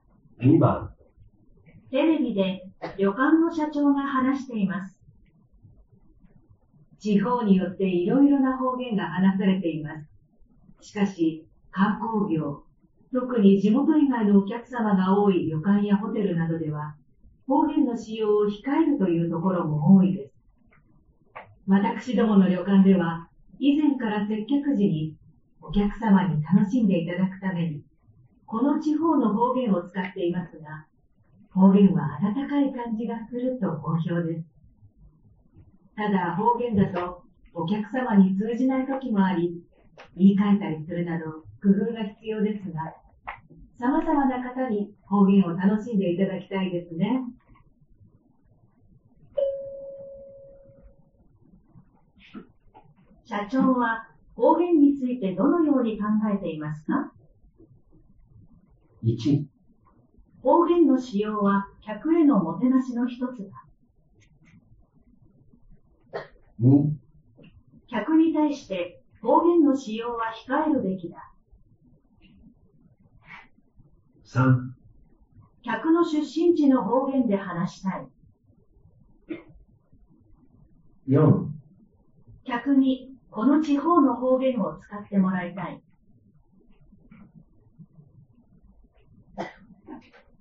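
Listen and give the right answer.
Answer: 1: 方言の使用は客へのもてなしの一つだ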